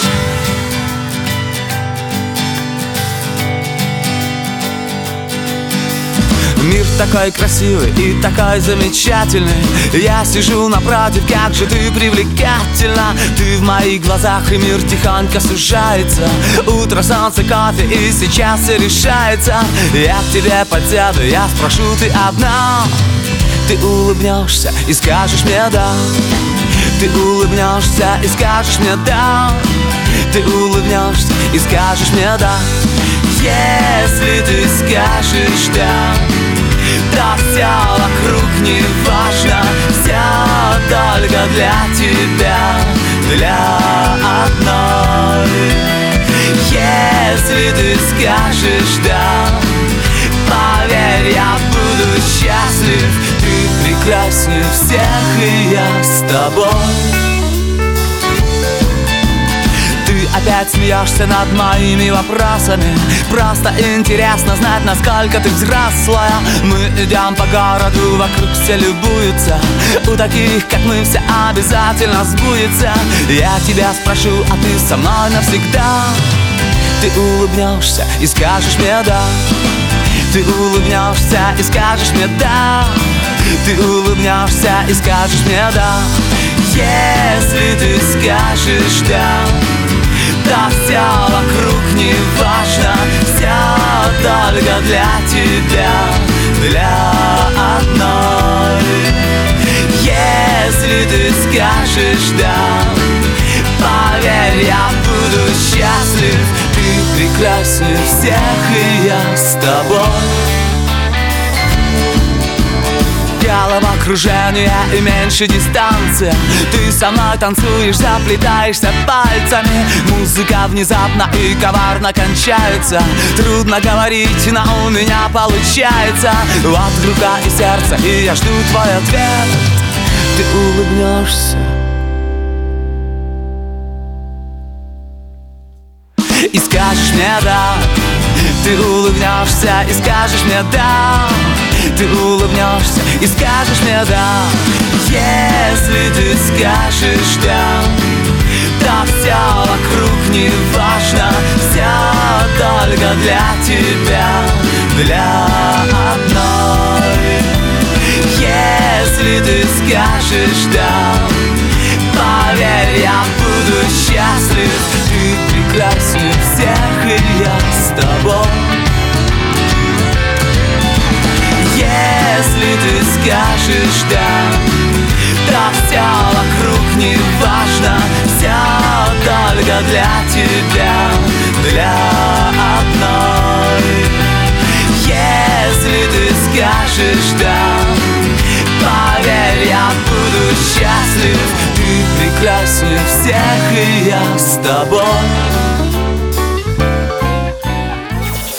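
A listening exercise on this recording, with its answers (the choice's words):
II. Выберите правильный вариант ответа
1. Молодой человек увидел девушку, когда она была...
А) с друзьями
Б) с родителями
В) одна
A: одна

I. Скажите, правильно или неправильно. Исправьте неправильные утверждения.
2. Молодой человек встретил девушку вечером.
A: неправильно (утром)

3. Девушка сначала не понравилась молодому человеку.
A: неправильно

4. Молодой человек задавал много разных вопросов.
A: правильно

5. Девушка не захотела выходить замуж за молодого человека.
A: неправильно

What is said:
Я с тобой
1. Мир такой красивый и такой замечательный
Я сижу напротив. Как же ты привлекательна!
Ты в моих глазах, и мир тихонько сужается.
Утро, солнце, кофе - и сейчас всё решается.
Я к тебе подсяду, я спрошу: «Ты одна?»
Ты улыбнёшься и скажешь мне: «да»!
Если ты скажешь «да»,
Всё только для тебя, для одной.
Поверь, я буду счастлив.
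Ты прекраснее всех, и я с тобой!
2. Ты опять смеёшься над моими вопросами,
Просто интересно знать, насколько ты взрослая!
Мы идем по городу, вокруг все любуются!
У таких, как мы, всё обязательно сбудется.
Я тебя спрошу: «А ты со мной навсегда?»
Ты со мной танцуешь, заплетаешься пальцами.
Музыка внезапно и коварно кончается.
Трудно говорить, но у меня получается.
Вот рука и сердце, и я жду твой ответ.
И скажешь мне: «да»!

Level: А2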